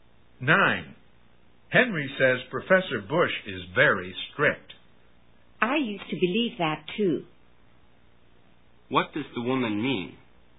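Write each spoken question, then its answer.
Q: What does the woman mean?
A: She no longer thinks Professor Bush is strict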